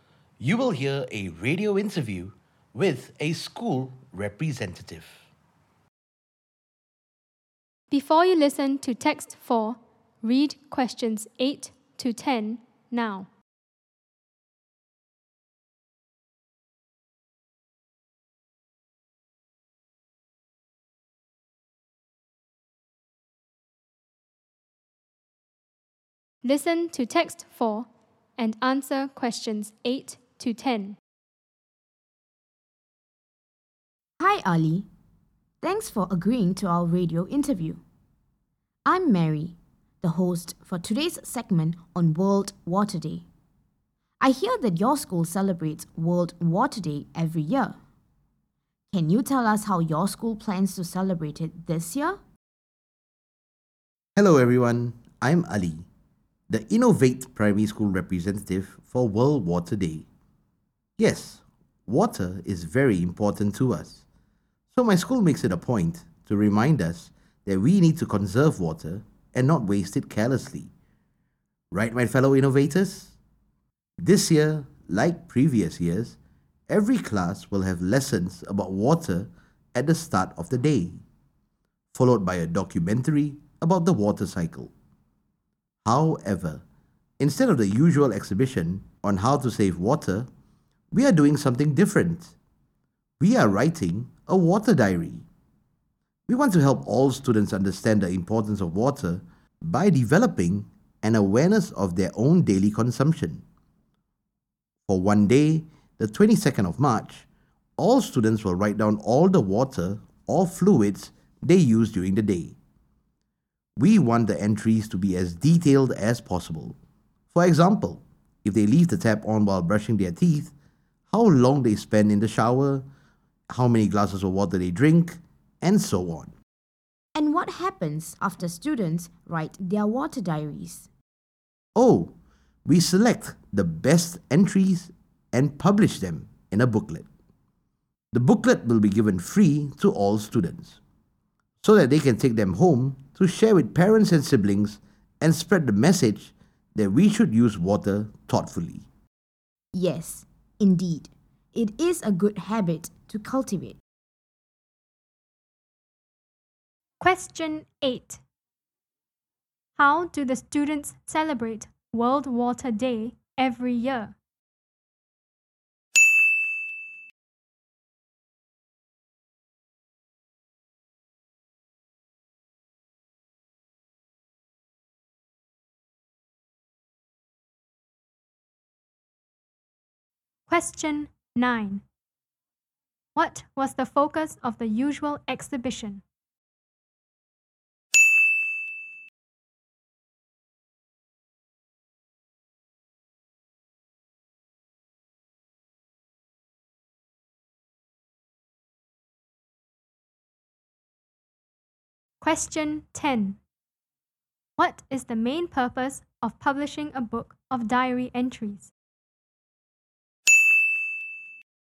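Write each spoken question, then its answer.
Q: How do the students celebrate World Water Day every year?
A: They have lessons about water at the start of the day, then watch a documentary about the water cycle

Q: What was the focus of the usual exhibition?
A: How to save water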